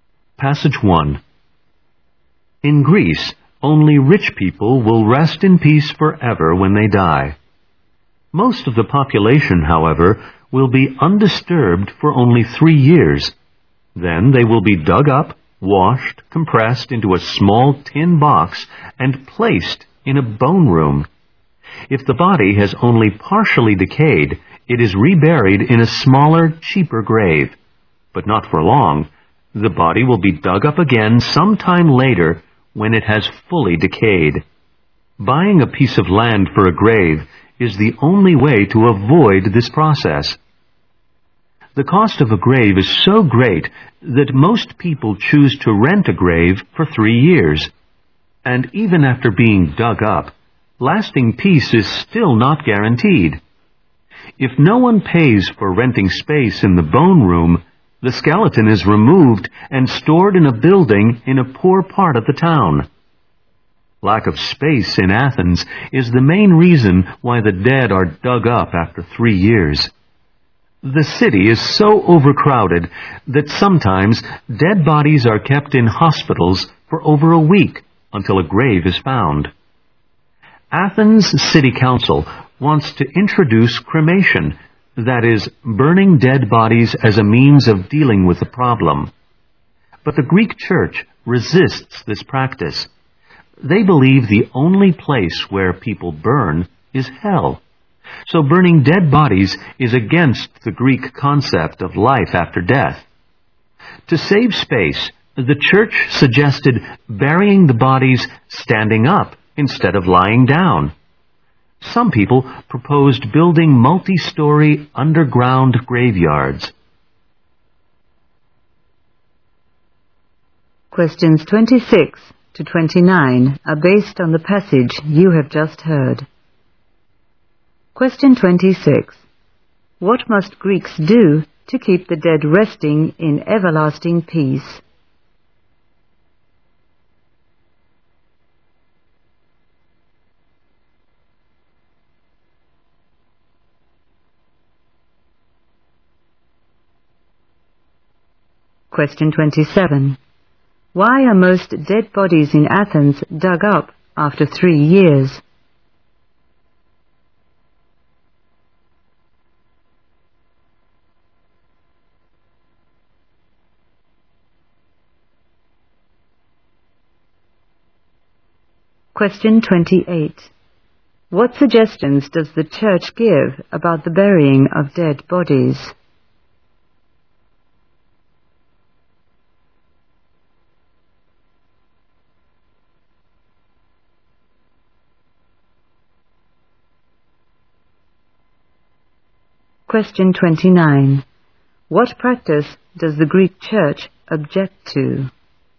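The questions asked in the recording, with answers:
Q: What must Greeks do to keep the dead resting in everlasting peace?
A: Buy a piece of land for a grave.

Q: Why are most dead bodies in Athens dug up after 3 years?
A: Lack of space in Athens.

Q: What suggestions does the church give about the burying of dead bodies?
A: Bury them standing up instead of lying down.

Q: What practice does the Greek church object to?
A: Cremation (burning dead bodies).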